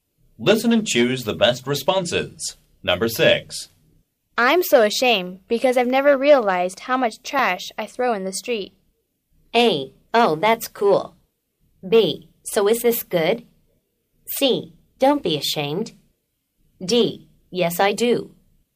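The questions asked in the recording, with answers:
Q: I'm so ashamed because I've never realized how much trash I throw in the street.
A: C: Don't be ashamed.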